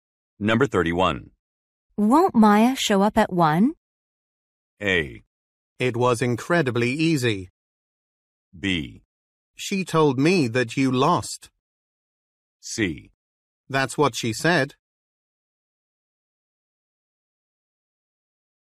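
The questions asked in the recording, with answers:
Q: Won't Maya show up at 1?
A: C: That's what she said.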